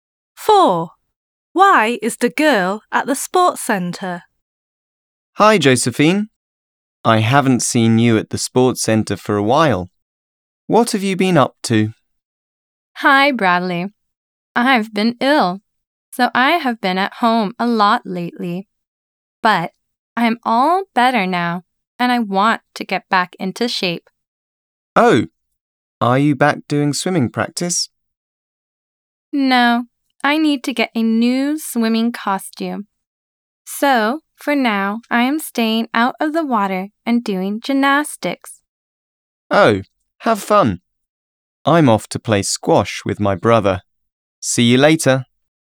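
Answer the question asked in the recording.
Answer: To do gymnastics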